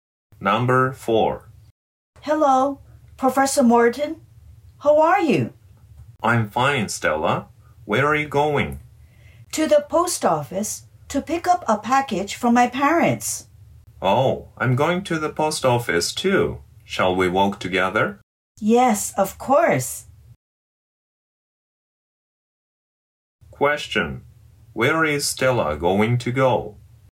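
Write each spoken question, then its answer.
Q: Where is Stella going to go?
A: To the post office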